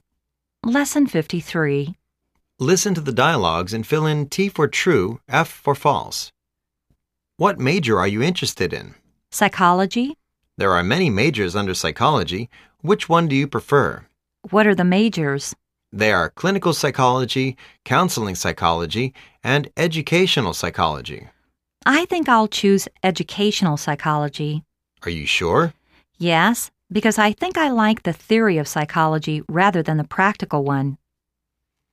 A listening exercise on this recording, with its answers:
Listen to the dialogues and fill in T for "True",F for "False".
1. He is looking for a major related to Philosophy.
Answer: False

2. The school has the major called Psychology.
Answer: True

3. There are more than three majors for him to choose.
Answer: False

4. He isn't very sure about what he chooses.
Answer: False

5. He likes to study theories rather than the applications.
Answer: True